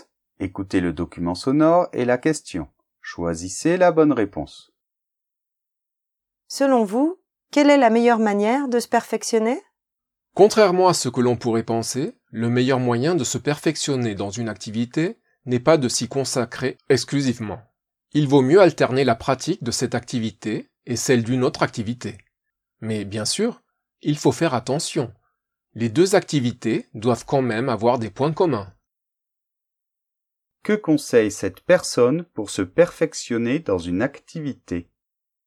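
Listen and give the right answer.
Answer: Alterner cette activité avec une autre activité qui a des points communs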